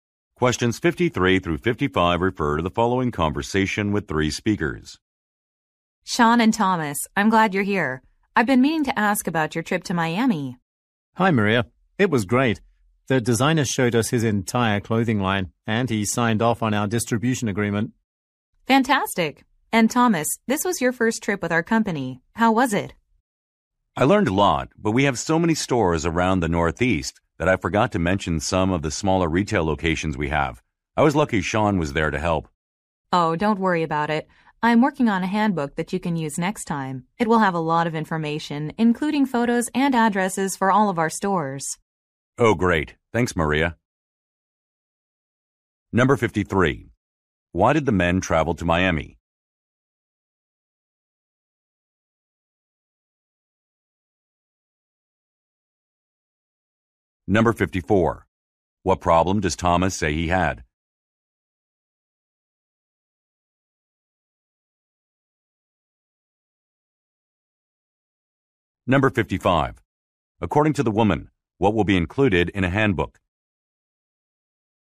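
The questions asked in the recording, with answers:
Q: Why did the men travel to Miami?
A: To meet a designer and finalize a distribution agreement

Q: What problem does Thomas say he had?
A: He forgot to mention some smaller retail locations

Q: According to the woman, what will be included in a handbook?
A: Photos and addresses of all stores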